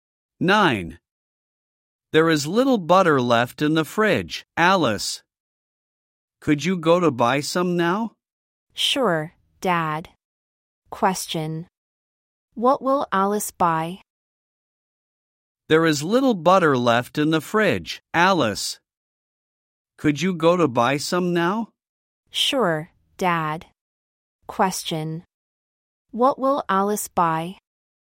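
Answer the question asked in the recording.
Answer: Butter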